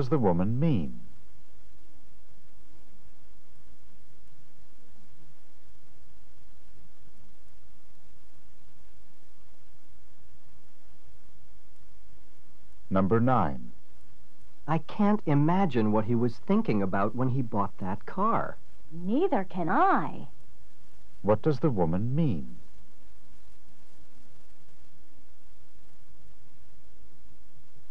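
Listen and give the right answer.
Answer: She can't understand why he bought the car either.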